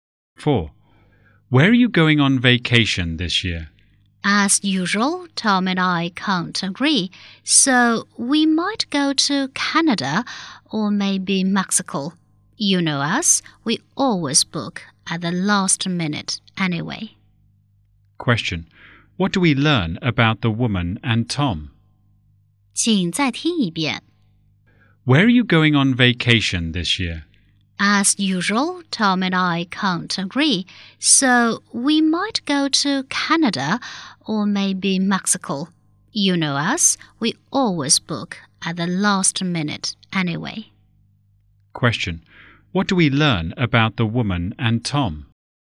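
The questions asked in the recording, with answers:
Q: Question. What do we learn about the woman and Tom?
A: They haven't decided where to go on vacation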